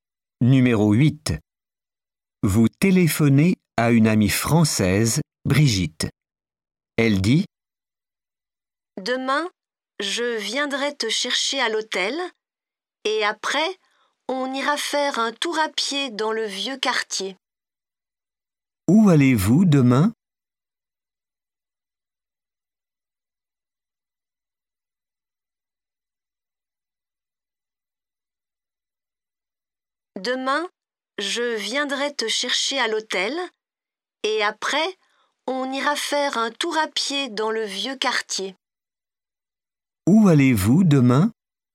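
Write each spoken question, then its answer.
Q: Où allez-vous demain?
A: Faire un tour à pied dans le vieux quartier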